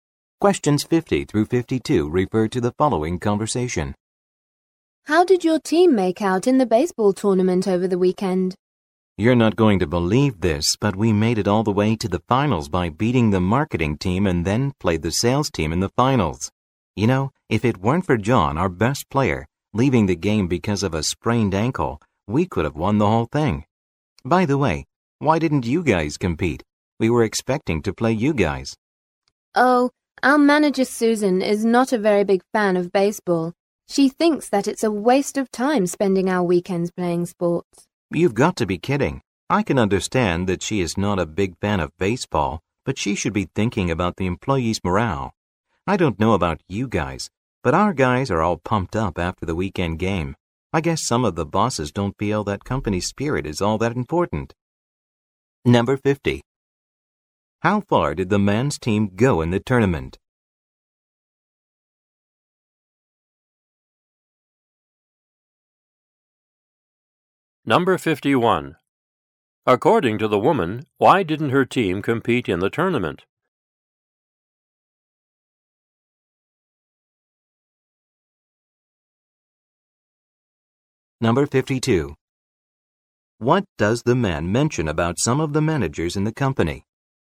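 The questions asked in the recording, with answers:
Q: How far did the man's team go in the tournament?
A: To the finals

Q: According to the woman, why didn't her team compete in the tournament?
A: Her manager thinks playing sports on weekends is a waste of time

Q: What does the man mention about some of the managers in the company?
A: They don't think company spirit is important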